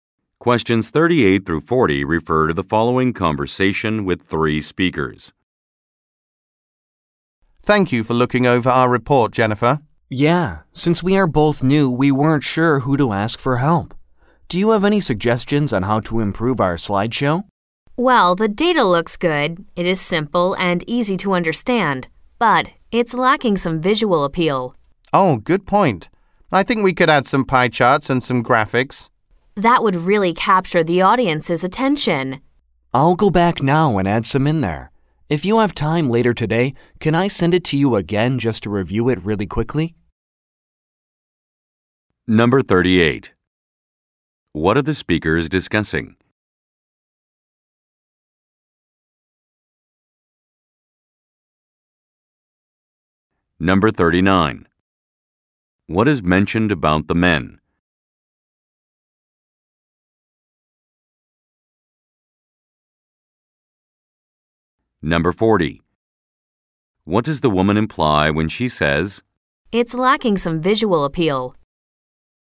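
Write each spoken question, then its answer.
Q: What are the speakers discussing?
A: A report's slideshow presentation

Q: What is mentioned about the men?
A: They are both new

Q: What does the woman imply when she says,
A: The slideshow needs more visuals, like charts and graphics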